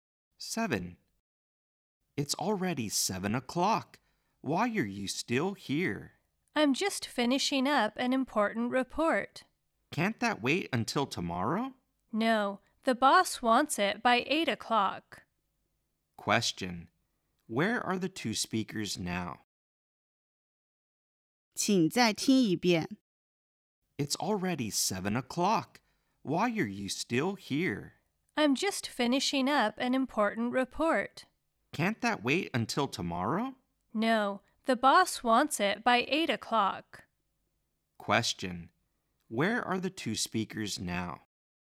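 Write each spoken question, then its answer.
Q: Where are the two speakers now?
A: In the office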